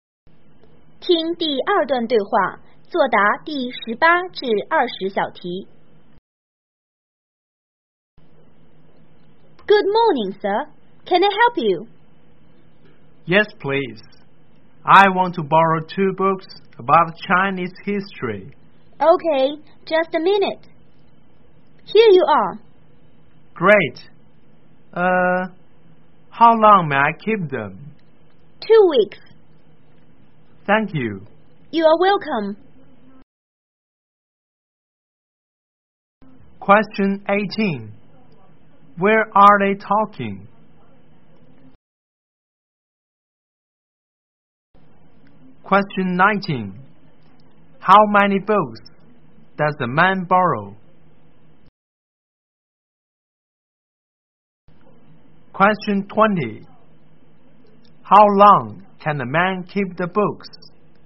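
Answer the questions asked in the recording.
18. In a library
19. Two
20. Two weeks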